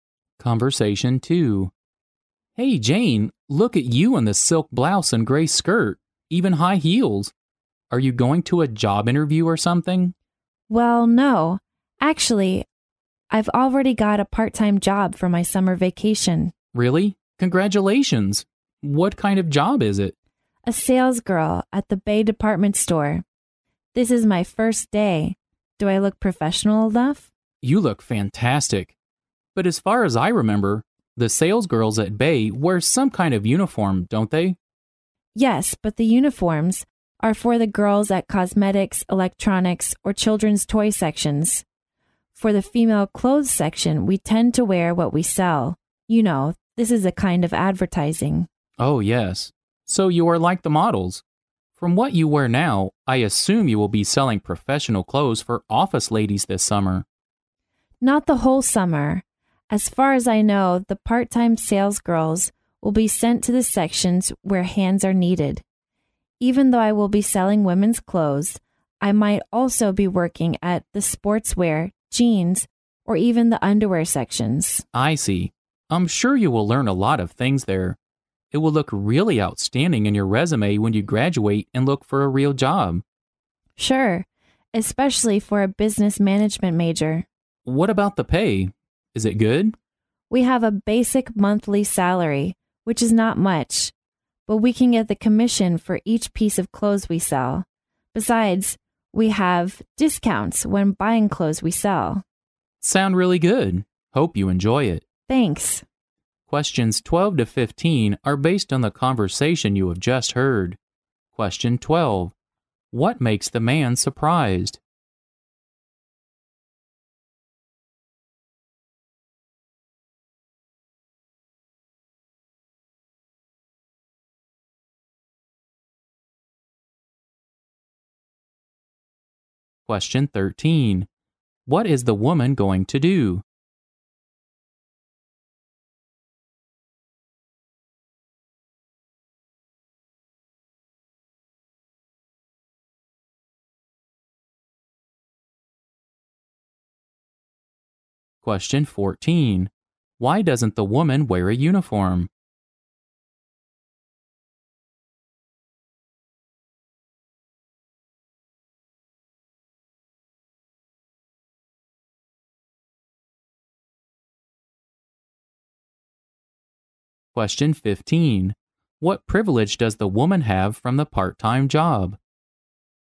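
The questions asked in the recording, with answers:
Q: What is the woman going to do?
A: Start a part-time job as a sales girl at the Bay department store.

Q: Why doesn't the woman wear a uniform?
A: Sales girls in the women's clothes section wear what they sell as a kind of advertising.

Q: What privilege does the woman have from the part-time job?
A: Discounts when buying the clothes they sell.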